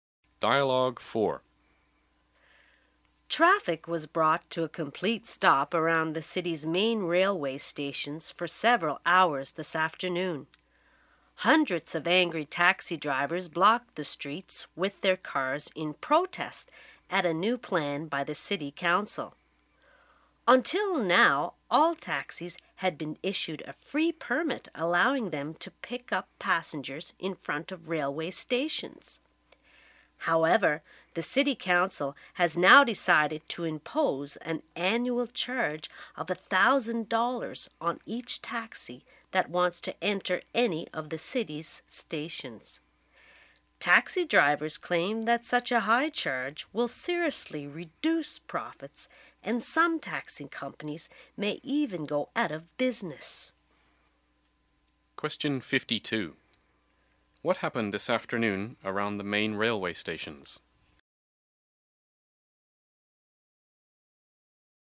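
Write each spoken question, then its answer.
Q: What happened this afternoon around the main railway stations?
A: Taxi drivers blocked the streets in protest, stopping traffic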